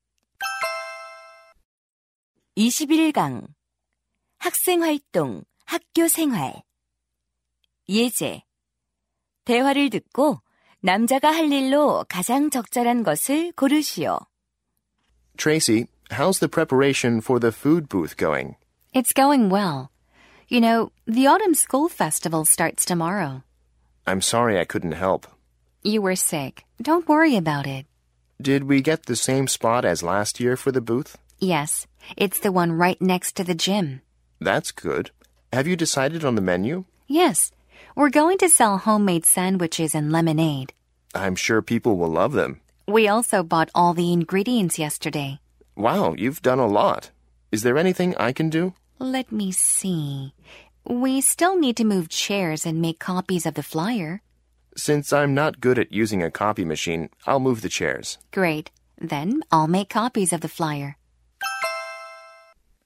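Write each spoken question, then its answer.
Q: 대화를 듣고 남자가 할 일로 가장 적절한 것을 고르시오.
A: 의자 옮기기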